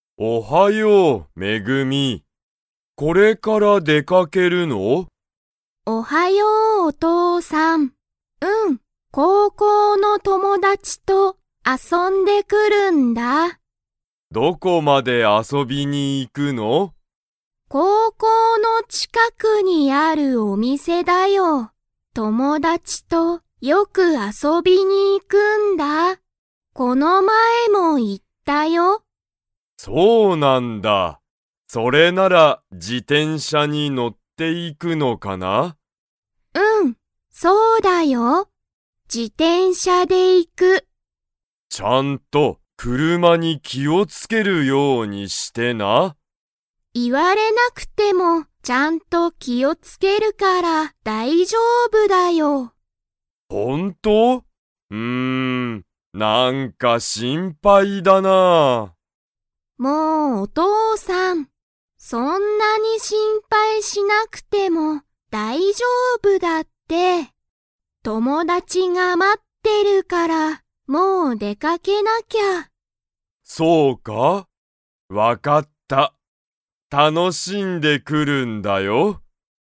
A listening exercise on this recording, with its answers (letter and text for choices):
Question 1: めぐみは、誰だれと出でかけますか?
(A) お父とうさん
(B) 会社かいしゃの先輩せんぱい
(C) 高校こうこうの友達ともだち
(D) 学校がっこうの先生せんせい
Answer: (C) 高校こうこうの友達ともだち

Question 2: めぐみは、 出でかける。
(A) 歩あるいて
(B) 自転車じてんしゃで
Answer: (B) 自転車じてんしゃで

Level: Level 3